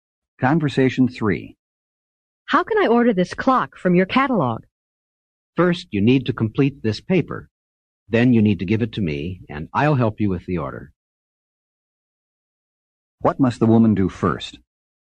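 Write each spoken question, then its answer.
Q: What must the woman do first?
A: Complete the paper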